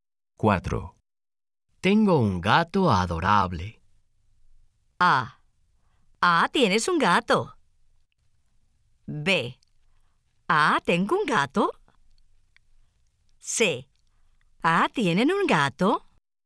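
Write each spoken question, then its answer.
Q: Tengo un gato adorable.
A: A: Ah, tienes un gato.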